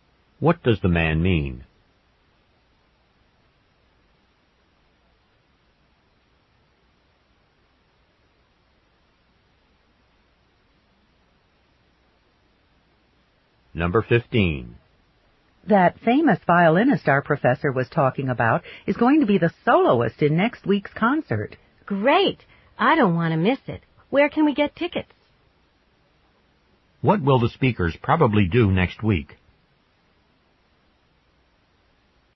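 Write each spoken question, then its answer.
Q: What will the speakers probably do next week?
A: Go to the concert.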